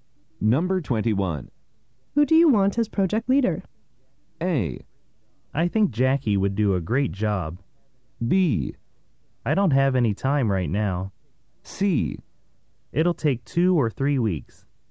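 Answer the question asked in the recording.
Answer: A: I think Jackie would do a great job.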